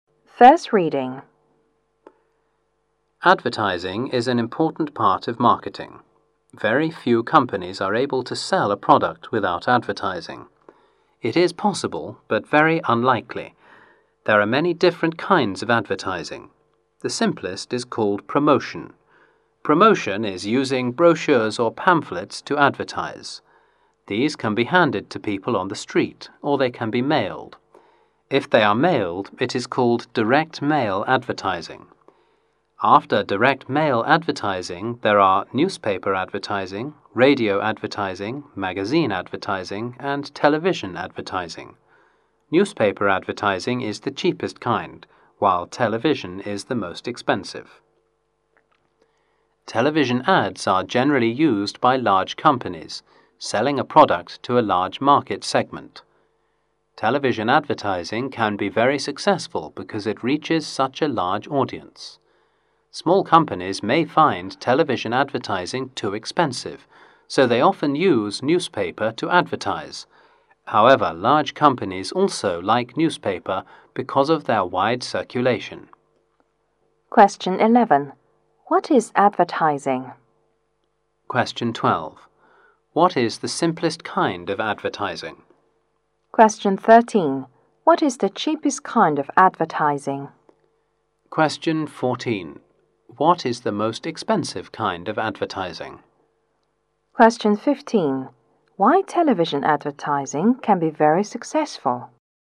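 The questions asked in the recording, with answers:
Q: What is advertising?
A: An important part of marketing

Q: What is the simplest kind of advertising?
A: Promotion

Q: What is the cheapest kind of advertising?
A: Newspaper advertising

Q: What is the most expensive kind of advertising?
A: Television advertising

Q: Why television advertising can be very successful?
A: It reaches a large audience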